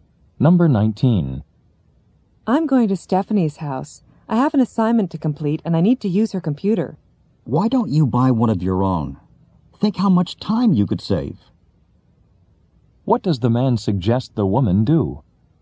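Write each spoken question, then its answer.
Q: What does the man suggest the woman do?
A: Buy her own computer.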